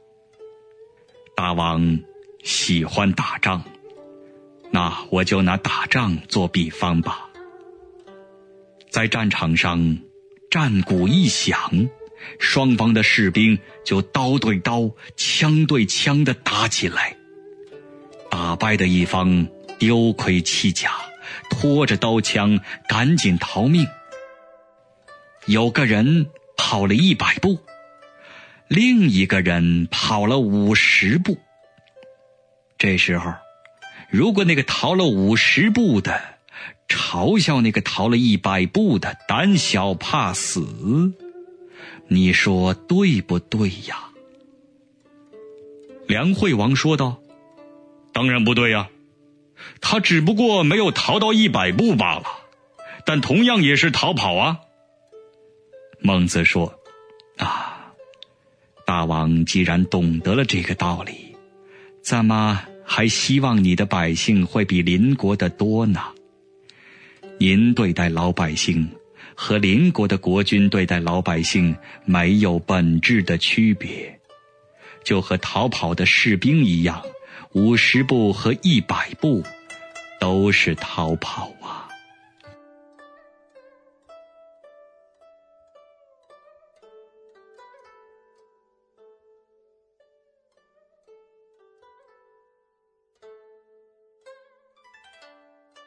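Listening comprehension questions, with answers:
★音声を聞き、空欄〇に当てはまる単語を探して、授業内課題用紙に漢字とピンインを書いてください。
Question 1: "〇〇不对呀。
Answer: 当然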